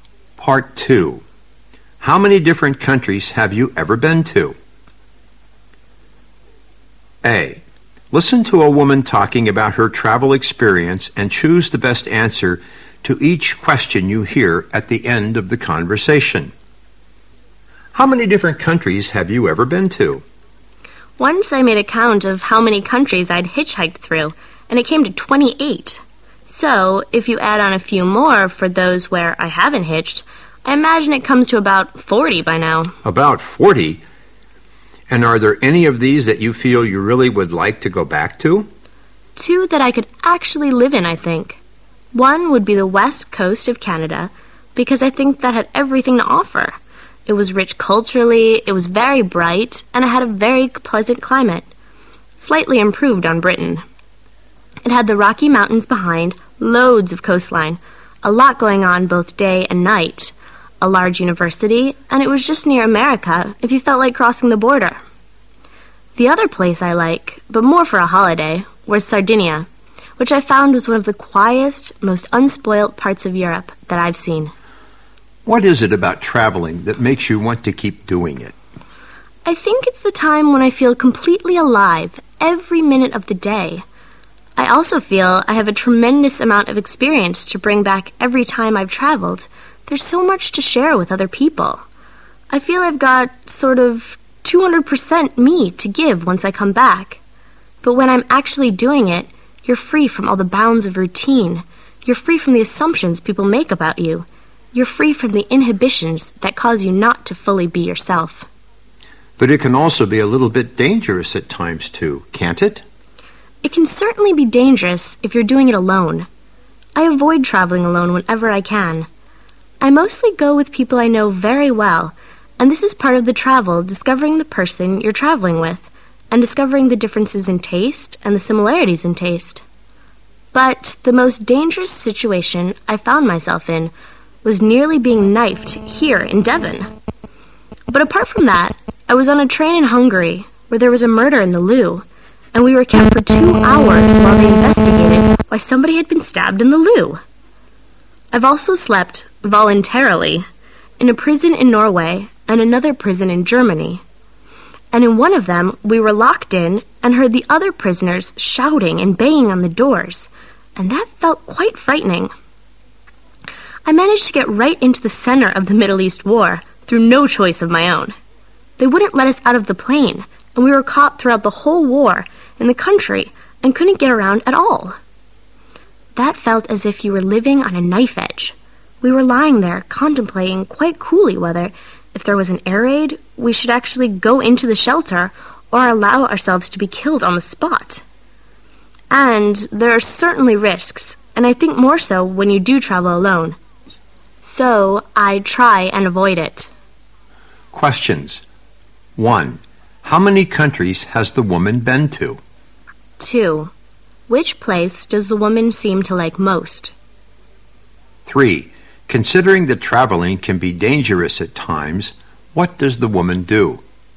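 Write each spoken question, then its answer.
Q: How many countries has the woman been to?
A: About 40

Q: Which place does the woman seem to like most?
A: The west coast of Canada

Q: Considering that traveling can be dangerous at times, what does the woman do?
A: She avoids traveling alone and goes with people she knows well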